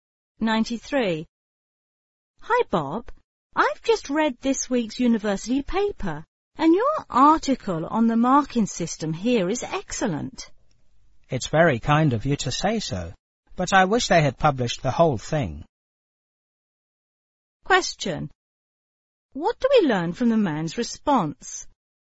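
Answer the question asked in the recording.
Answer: His article was only partly published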